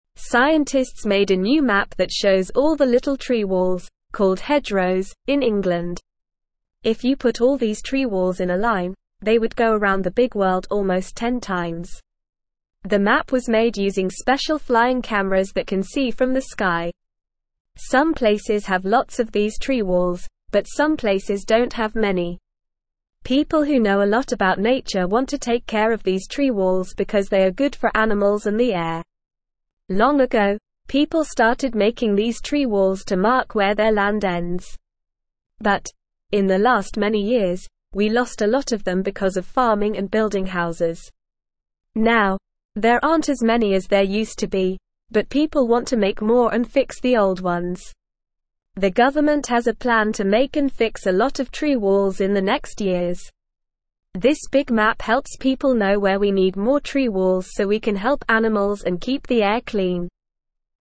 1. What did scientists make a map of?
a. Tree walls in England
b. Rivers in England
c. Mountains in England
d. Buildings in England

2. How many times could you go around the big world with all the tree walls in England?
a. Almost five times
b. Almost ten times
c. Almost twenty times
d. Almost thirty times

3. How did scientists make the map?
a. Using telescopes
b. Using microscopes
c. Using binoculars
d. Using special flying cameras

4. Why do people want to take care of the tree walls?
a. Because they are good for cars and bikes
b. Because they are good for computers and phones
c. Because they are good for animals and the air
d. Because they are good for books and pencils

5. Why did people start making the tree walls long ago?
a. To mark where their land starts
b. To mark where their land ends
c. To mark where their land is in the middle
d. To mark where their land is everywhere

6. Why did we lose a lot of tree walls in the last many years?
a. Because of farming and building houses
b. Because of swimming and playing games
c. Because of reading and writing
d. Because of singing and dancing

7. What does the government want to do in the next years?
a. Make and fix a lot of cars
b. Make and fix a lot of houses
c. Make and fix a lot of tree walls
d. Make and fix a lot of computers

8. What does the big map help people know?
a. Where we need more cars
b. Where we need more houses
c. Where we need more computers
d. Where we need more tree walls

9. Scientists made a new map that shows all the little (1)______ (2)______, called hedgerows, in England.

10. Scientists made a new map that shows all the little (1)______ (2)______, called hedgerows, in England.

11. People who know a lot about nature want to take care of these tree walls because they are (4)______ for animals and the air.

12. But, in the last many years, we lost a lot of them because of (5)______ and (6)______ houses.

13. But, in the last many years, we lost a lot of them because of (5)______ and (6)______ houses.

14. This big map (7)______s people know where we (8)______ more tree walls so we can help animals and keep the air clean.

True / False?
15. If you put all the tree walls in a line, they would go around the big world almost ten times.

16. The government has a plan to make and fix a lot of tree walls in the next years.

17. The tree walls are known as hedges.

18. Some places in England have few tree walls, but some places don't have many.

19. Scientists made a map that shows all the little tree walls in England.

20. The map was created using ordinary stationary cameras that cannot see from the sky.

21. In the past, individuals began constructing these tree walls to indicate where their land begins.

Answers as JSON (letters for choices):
{"1": "a", "2": "b", "3": "d", "4": "c", "5": "b", "6": "a", "7": "c", "8": "d", "9": "tree", "10": "walls", "11": "good", "12": "farming", "13": "building", "14": "need", "15": "True", "16": "True", "17": "False", "18": "False", "19": "True", "20": "False", "21": "False"}

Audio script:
Scientists made a new map that shows all the little tree walls, called hedgerows, in England. If you put all these tree walls in a line, they would go around the big world almost ten times. The map was made using special flying cameras that can see from the sky. Some places have lots of these tree walls, but some places don't have many. People who know a lot about nature want to take care of these tree walls because they are good for animals and the air.
Long ago, people started making these tree walls to mark where their land ends. But, in the last many years, we lost a lot of them because of farming and building houses. Now, there aren't as many as there used to be, but people want to make more and fix the old ones. This big map helps people know where we need more tree walls so we can help animals and keep the air clean.

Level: Level 1